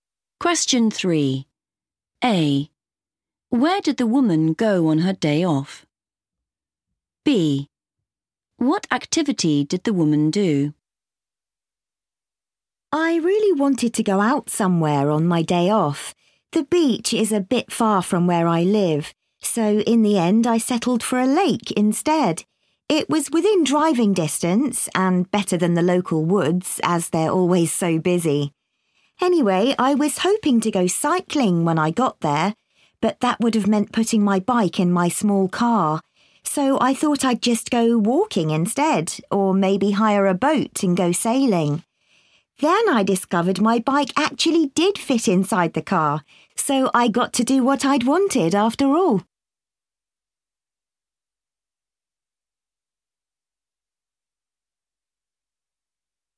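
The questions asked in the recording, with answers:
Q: Where did the woman go on her day off?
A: a lake

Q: What activity did the woman do?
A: cycling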